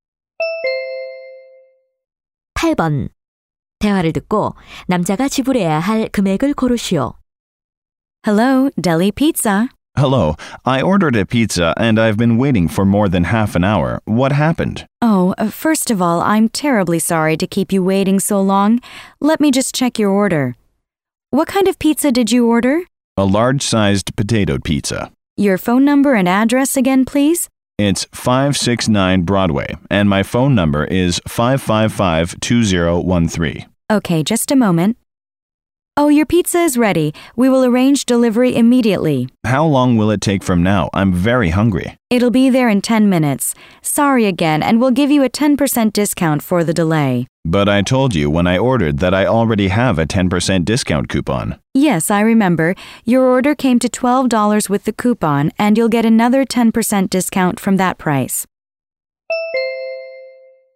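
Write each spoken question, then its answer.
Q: 대화를 듣고 남자가 지불해야 할 금액을 고르시오.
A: $10.80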